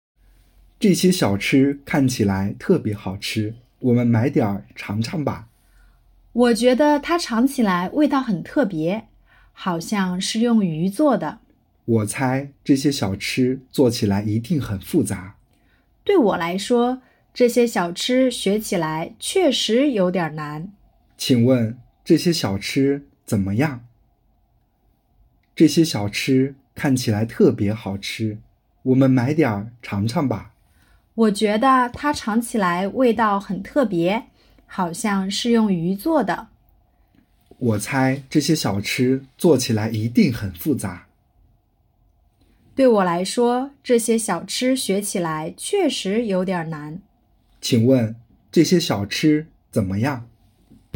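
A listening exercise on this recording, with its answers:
这些小吃怎么样?- zhèxiē xiǎochī zěnme yàng?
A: 看起来很好吃,味道很特别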